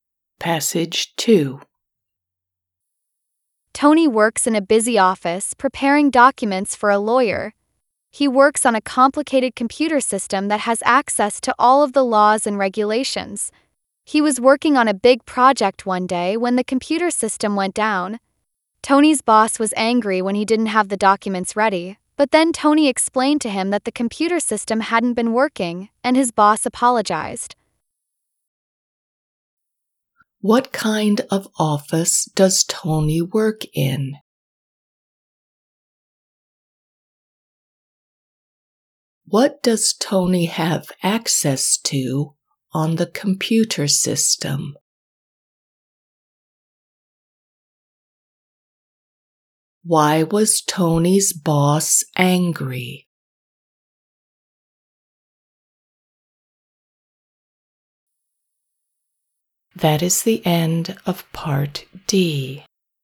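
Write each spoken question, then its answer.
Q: What kind of office does Tony work in?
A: a busy lawyer's office

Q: What does Tony have access to on the computer system?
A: all the laws and regulations

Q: Why was Tony's boss angry?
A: the documents weren't ready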